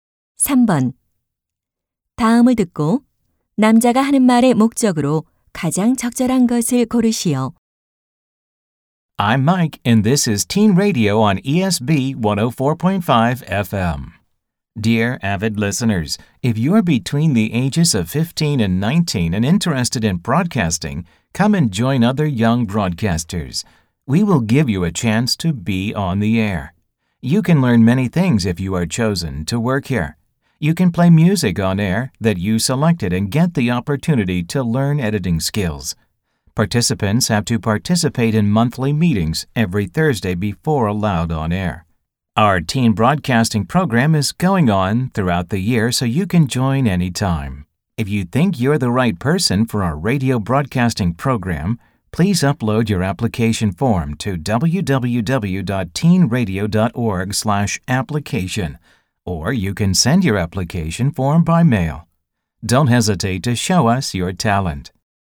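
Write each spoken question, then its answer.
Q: 다음을 듣고 남자가 하는 말의 목적으로 가장 적절한 것을 고르시오.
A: 청소년 라디오 방송 프로그램 참가자를 모집하려고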